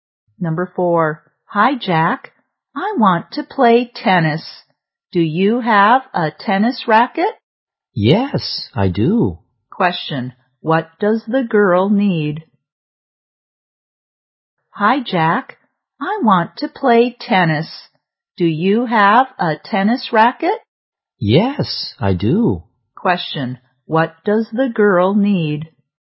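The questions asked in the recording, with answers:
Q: Question. What does the girl need?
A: A tennis racket.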